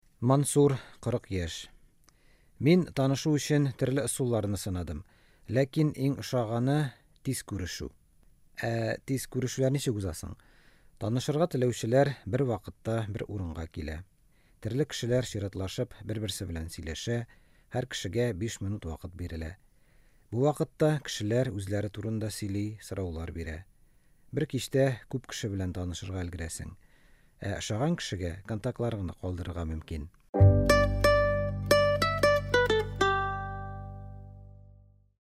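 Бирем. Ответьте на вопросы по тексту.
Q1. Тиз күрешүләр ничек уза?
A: Танышырга теләүчеләр бер урынга килә, чиратлашып бер-берсе белән сөйләшә, һәр кешегә 5 минут бирелә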